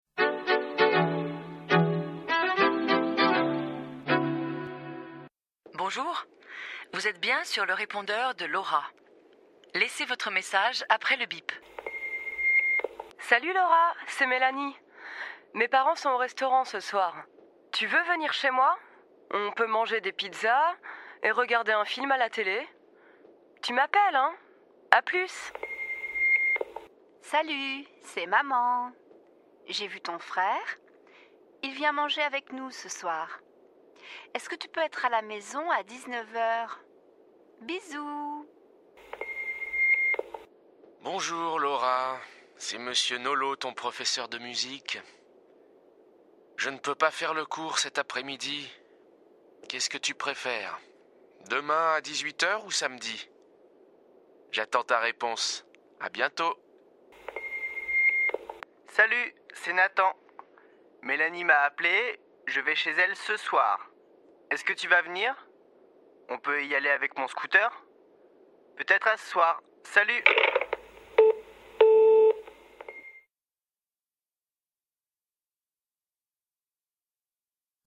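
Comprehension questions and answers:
Preberite spodnjo zatrditev, po potrebi prisluhnite zvočnemu posnetku in označite pravi odgovor izmed " Vrai /Faux / On ne sait pas ".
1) Mélanie propose une sortie à la pizzeria.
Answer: Faux

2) Il y a un bon film à la télévision.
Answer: On ne sait pas

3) Les parents de Mélanie dînent au restaurant ce soir-là.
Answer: Vrai

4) Mélanie demande à Laura de la rappeler.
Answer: Vrai

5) La mère de Laura l'invite à déjeuner.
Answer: Faux

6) L'invitation de la maman de Laura est pour le jour de l'appel.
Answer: Vrai

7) Le frère de Laura dîne chez ses parents ce soir-là.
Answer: Vrai

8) Laura apprend la musique avec M. Nolot.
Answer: Vrai

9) M. Nolot appelle pour annuler son rendez-vous.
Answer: Vrai

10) Il n'est pas libre samedi.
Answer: Faux

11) Il propose un autre rendez-vous le lendemain à 18h.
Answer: Vrai

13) Nathan invite Mélanie et Laura chez lui.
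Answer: Faux

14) Il propose à Laura de l'emmener en scooter.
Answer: Vrai

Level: Niveau A1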